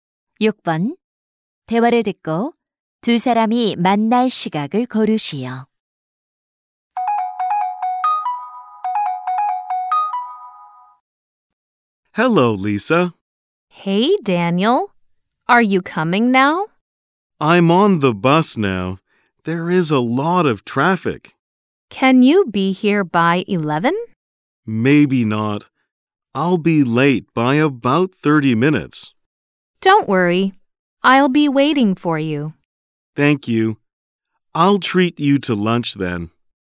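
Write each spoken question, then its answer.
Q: 대화를 듣고 두 사람이 만날 시각을 고르시오.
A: 11시 30분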